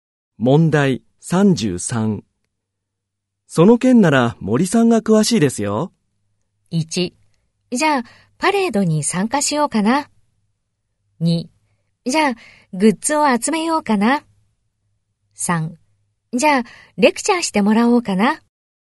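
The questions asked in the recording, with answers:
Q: その件なら森さんが詳しいですよ。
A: 3: じゃあ、レクチャーしてもらおうかな。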